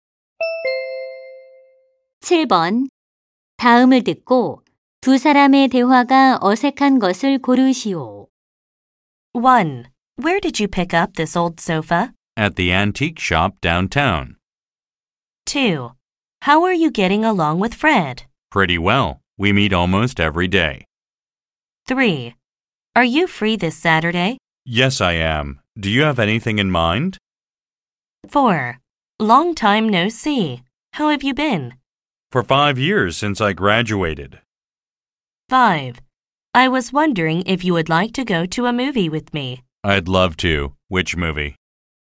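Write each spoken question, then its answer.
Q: 다음을 듣고 두 사람의 대화가 어색한 것을 고르시오.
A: 4: Long time no see. How have you been? / For 5 years since I graduated.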